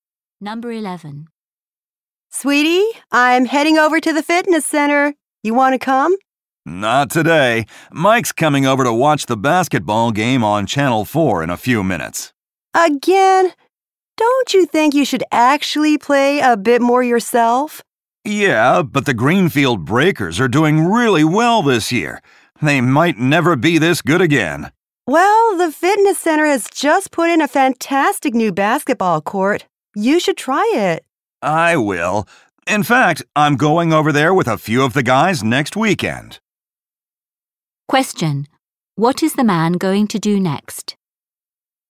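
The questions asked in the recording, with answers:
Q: Question. What is the man going to do next?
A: Watch the basketball game on TV with Mike.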